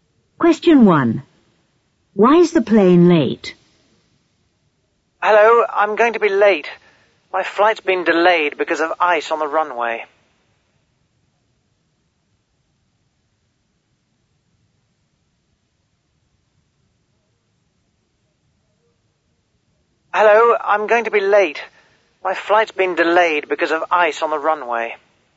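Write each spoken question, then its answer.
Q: Why is the plane late?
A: Because of ice on the runway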